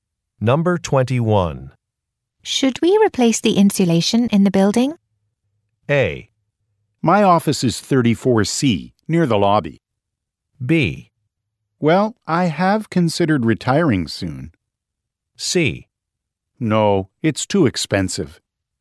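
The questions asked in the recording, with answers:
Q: Should we replace the insulation in the building?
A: C: No, it's too expensive.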